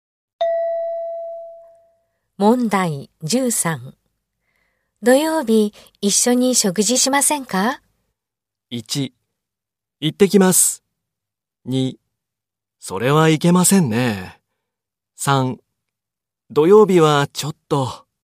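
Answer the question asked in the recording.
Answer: 3: 土曜日はちょっと。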